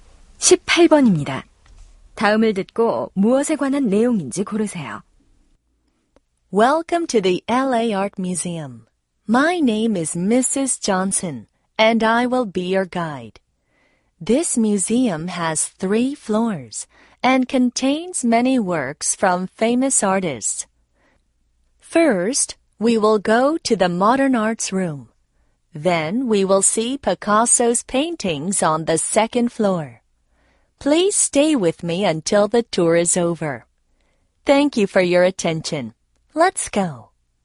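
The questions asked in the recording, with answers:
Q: 다음을 듣고 무엇에 관한 내용인지 고르세요.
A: 미술관 관람 안내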